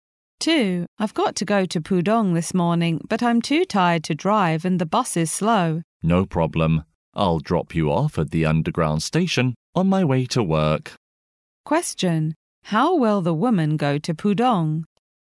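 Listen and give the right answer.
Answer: By underground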